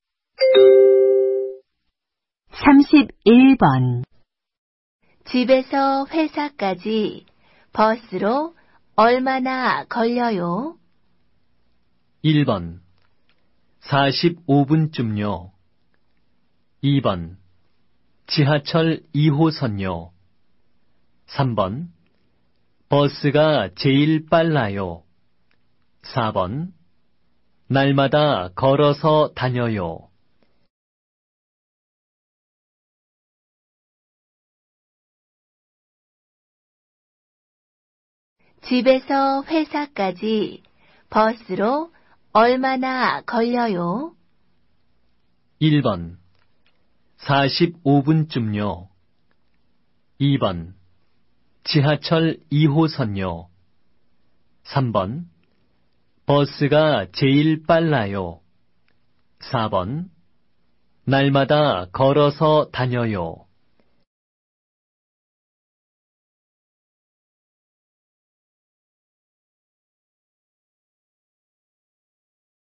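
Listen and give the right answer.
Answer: 1: 45분쯤요.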